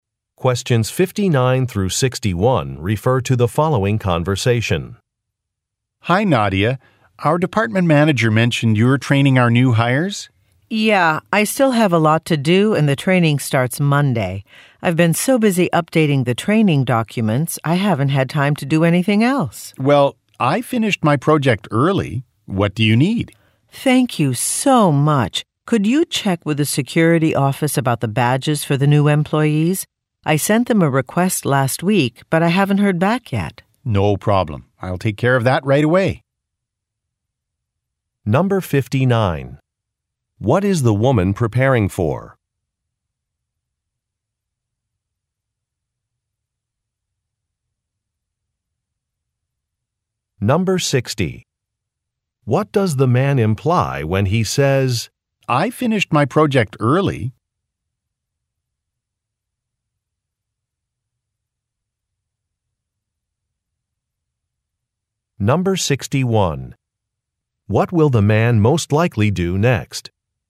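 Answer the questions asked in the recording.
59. Training new employees that starts Monday
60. He has time to help her
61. Contact the security office about badges for the new employees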